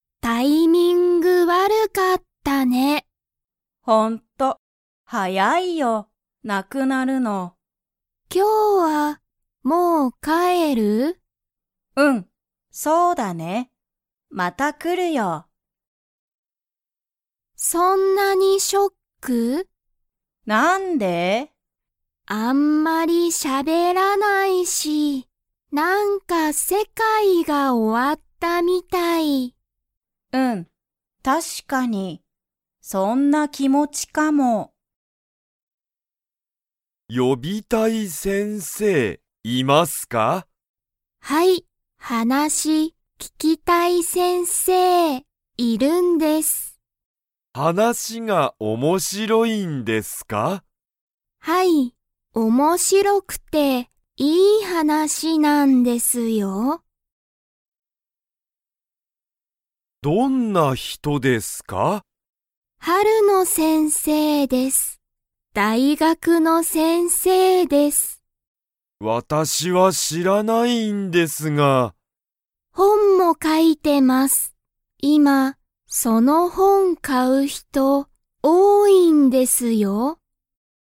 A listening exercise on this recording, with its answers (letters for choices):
Comprehension Quiz (Skip if you don't understand the conversation yet)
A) はい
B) いいえ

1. ジュンは、今日きょう、本(ほん)を買(か)いますか?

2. ジュンは、よくしゃべっていますか?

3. その先生(せんせい)の話(はなし)は____。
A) 悪(わる)い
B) はやい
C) 新(あたら)しい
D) 面白(おもしろ)い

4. 春野先生(はるのせんせい)は、____の先生(せんせい)だ。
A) 大学(だいがく)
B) 子供(こども)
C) 英語(えいご)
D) 写真(しゃしん)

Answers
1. B
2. B
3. D
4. A